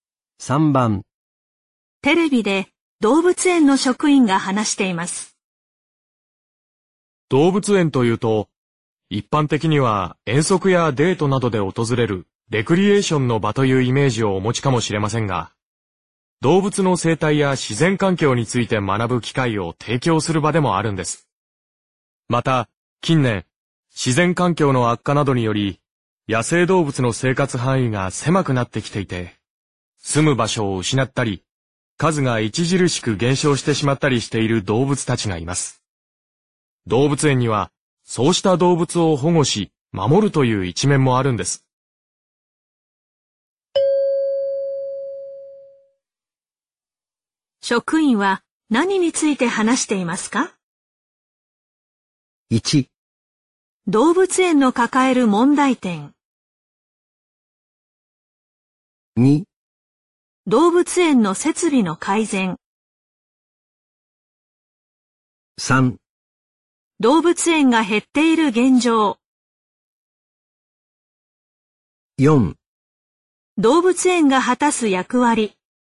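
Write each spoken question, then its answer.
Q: 職員は何について話していますか?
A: 4: 動物園が果たす役割。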